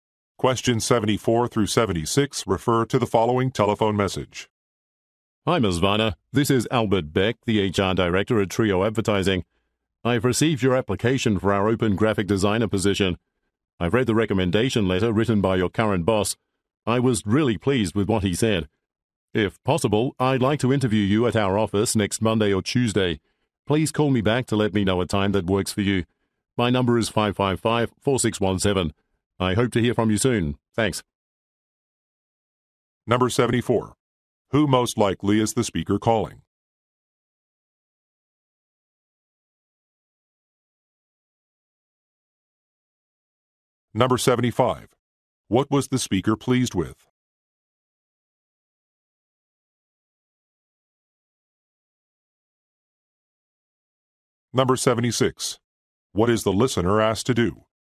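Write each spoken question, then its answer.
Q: Who most likely is the speaker calling?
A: A job applicant for a graphic designer position

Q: What was the speaker pleased with?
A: A recommendation letter

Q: What is the listener asked to do?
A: Call back to arrange an interview time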